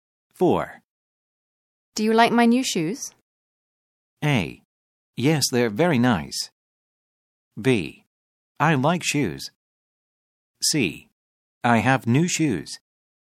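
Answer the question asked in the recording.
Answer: A: Yes, they're very nice.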